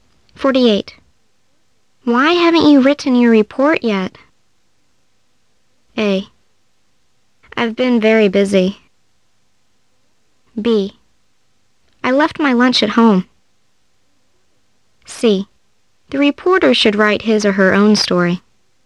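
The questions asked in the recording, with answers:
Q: Why haven't you written your report yet?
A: A: I've been very busy.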